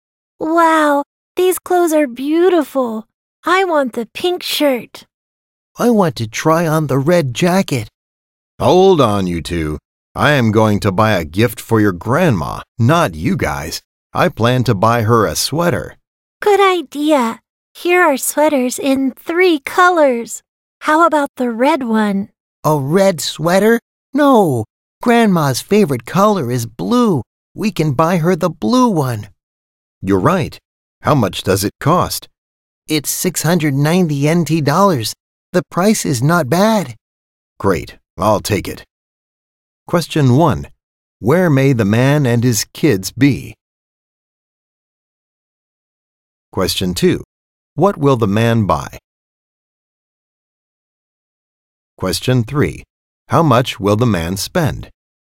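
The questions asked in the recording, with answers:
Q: Where may the man and his kids be?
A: At a clothing store

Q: What will the man buy?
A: A blue sweater

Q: How much will the man spend?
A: 690 NT dollars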